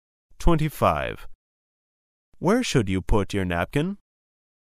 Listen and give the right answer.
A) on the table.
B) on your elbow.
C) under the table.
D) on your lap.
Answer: D) on your lap.

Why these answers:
此题考查听细节信息的能力。解题关键在于听到关键词"lap"大腿前部。